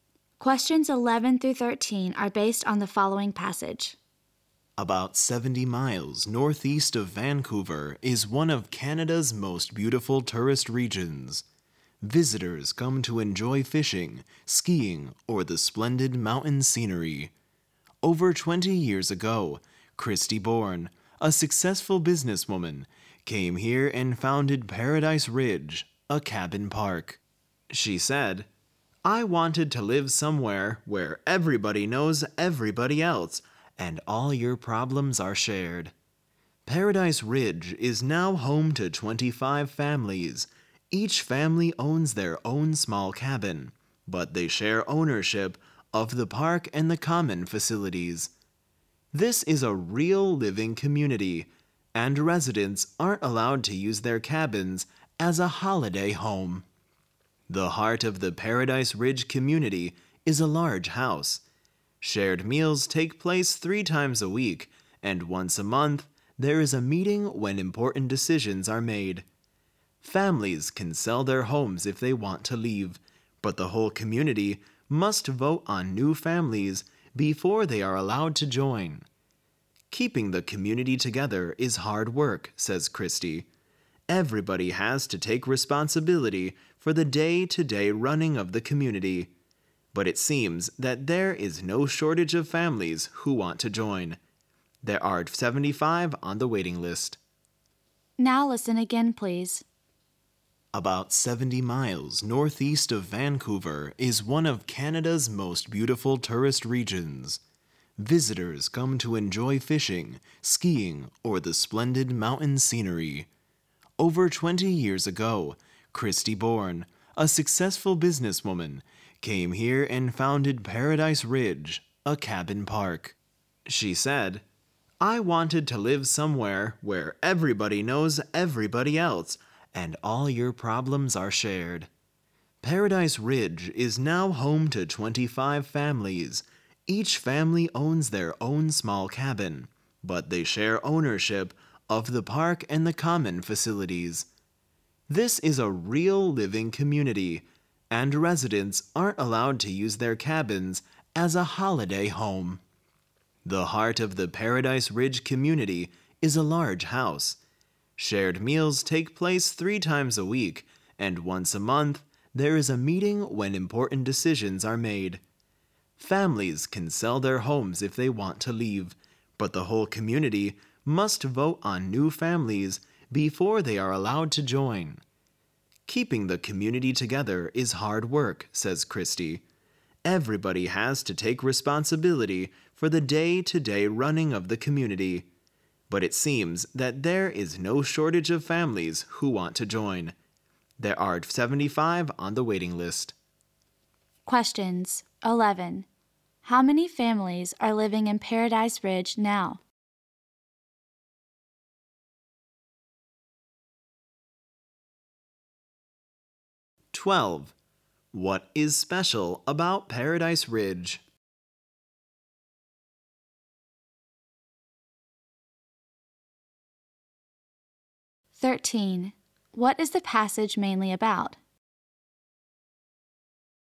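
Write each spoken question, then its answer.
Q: How many families are living in Paradise Ridge now?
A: 25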